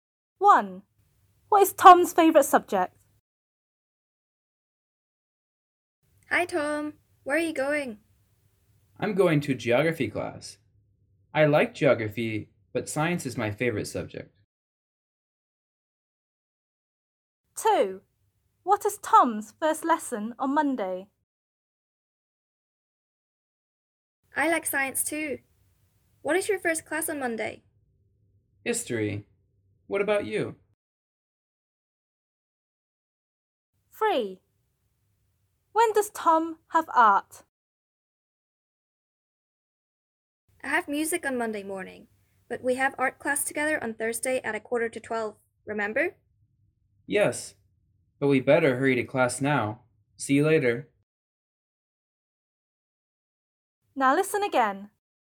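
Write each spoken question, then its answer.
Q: What is Tom's favourite subject?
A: science

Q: What is Tom's first lesson on Monday?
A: history

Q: When does Tom have art?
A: Thursday at 11:45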